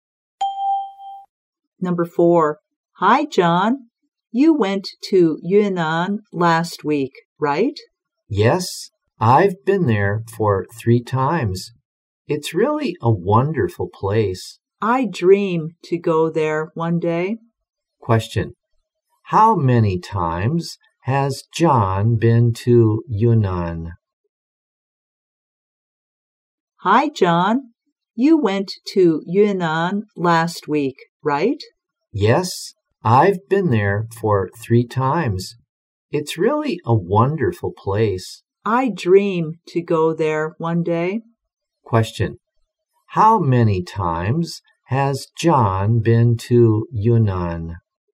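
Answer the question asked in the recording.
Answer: 3 times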